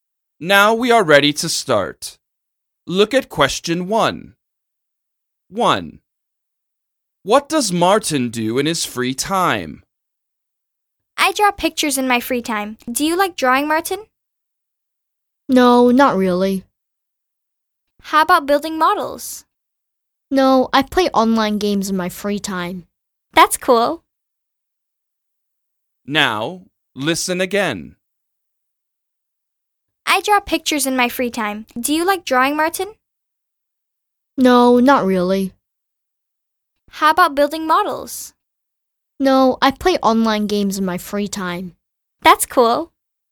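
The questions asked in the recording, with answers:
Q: What does Martin do in his free time?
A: He plays online games.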